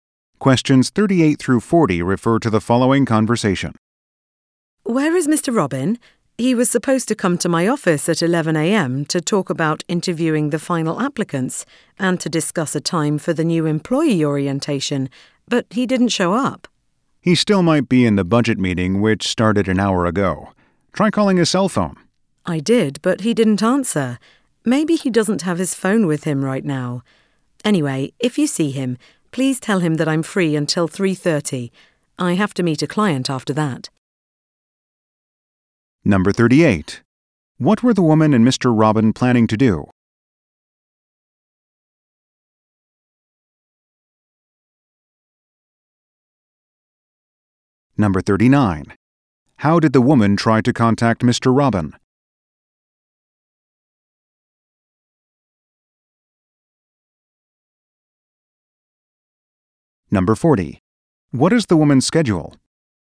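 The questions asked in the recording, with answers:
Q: What were the woman and Mr. Robin planning to do?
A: Meet to talk about interviewing final applicants and the orientation

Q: How did the woman try to contact Mr. Robin?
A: By calling his cell phone

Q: What is the woman's schedule?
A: Free until 3:30, then meeting a client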